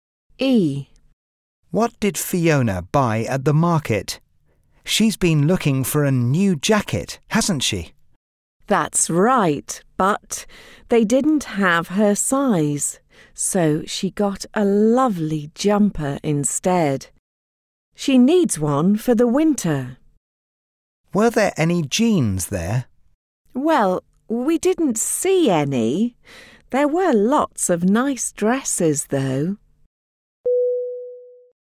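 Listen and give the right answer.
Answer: A jumper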